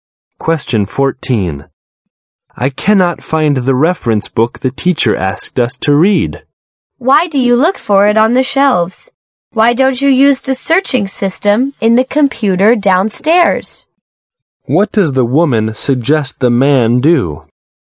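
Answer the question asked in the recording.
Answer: Use the computer search system downstairs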